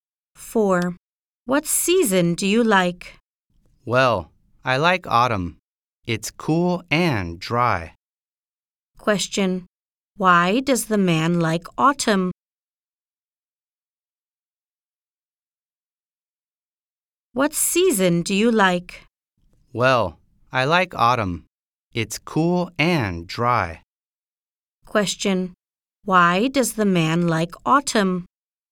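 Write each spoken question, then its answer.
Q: Why does the man like autumn?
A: Because it's cool and dry.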